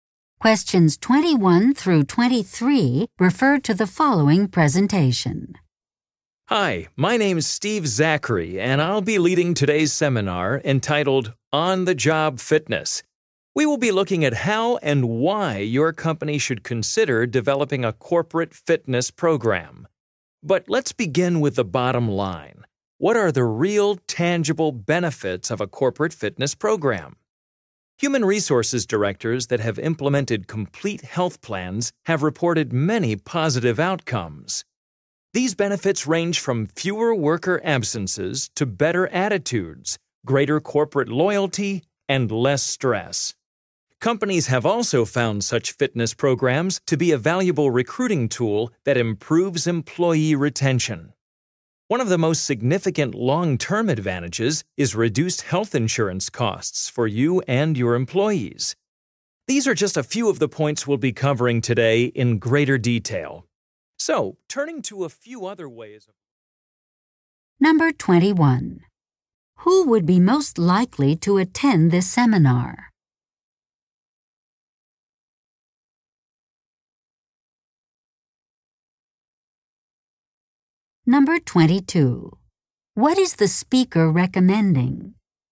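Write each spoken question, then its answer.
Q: What is the speaker recommending?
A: Developing a corporate fitness program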